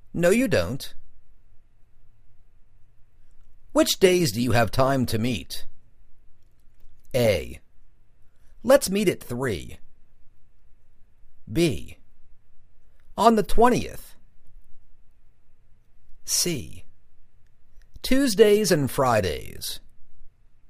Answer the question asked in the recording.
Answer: Tuesdays and Fridays